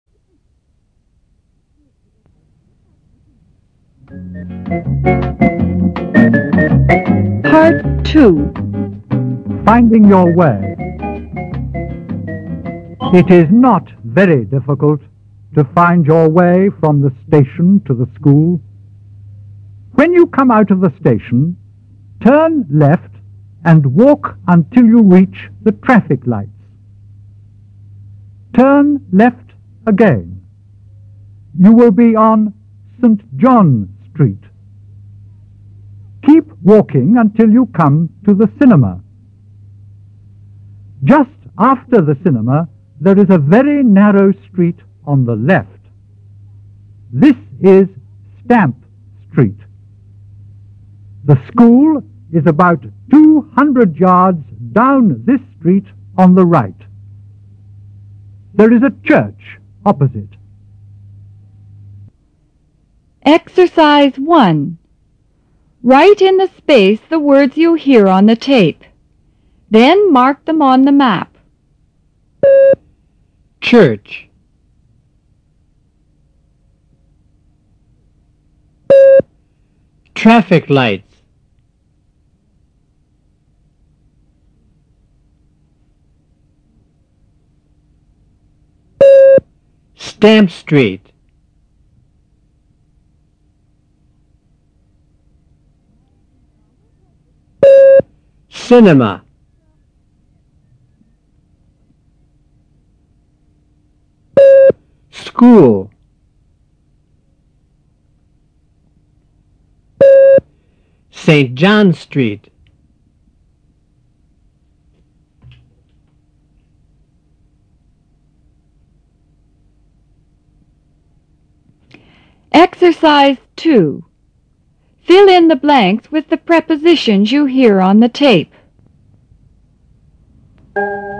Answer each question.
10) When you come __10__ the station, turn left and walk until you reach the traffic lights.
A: out of

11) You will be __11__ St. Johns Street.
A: on

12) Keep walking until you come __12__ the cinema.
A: to

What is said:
Finding Your way (56")
It is not very difficult to find your way from the station to the school. When you come out of the station, turn left and walk until you reach the traffic lights. Turn left again. You will be on St. Johns Street. Keep walking until you come to the cinema. Just after the cinema, there is a very narrow street on the left. This is Stamp Street. The school is about two hundred yards down this street on the right. There is a church opposite.